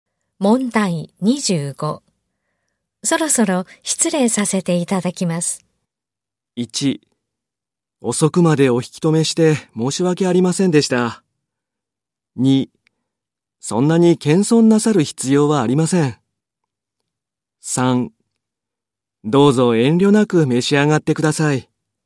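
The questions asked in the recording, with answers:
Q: そろそろ失礼させていただきます。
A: 1: 遅くまでお引き止めして申し訳ありませんでした。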